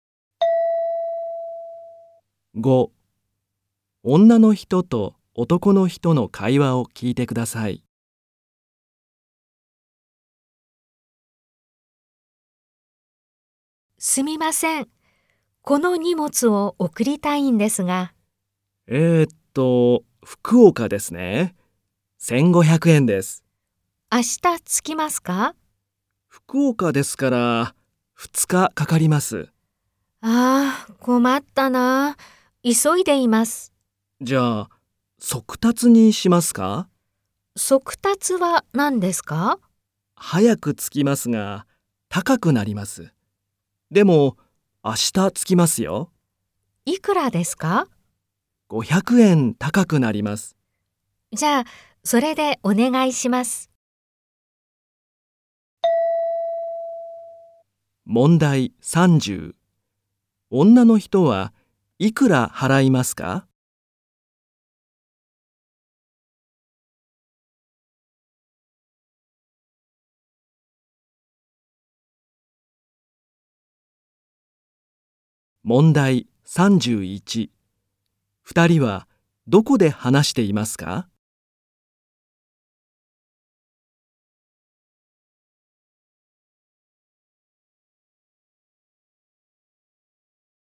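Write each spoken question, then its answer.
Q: 女の人はいくら払いますか?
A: 2000円

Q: 二人はどこで話していますか?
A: 郵便局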